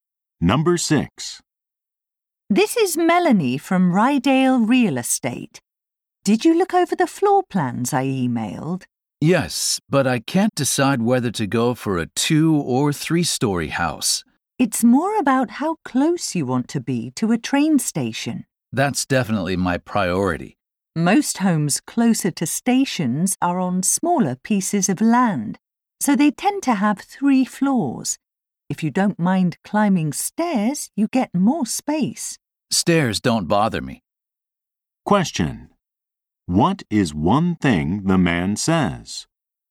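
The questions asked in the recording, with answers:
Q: What is one thing the man says?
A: Being close to a train station is his priority and stairs don't bother him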